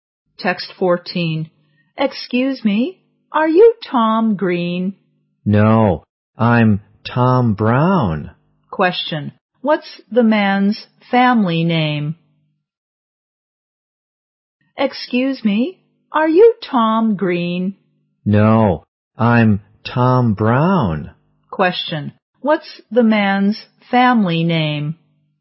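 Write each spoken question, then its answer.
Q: What's the man's family name?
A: Brown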